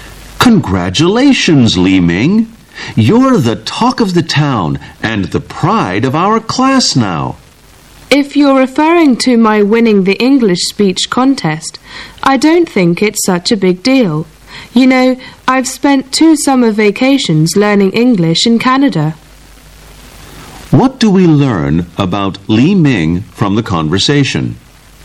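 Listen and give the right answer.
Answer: He won the English speech contest but is modest about it.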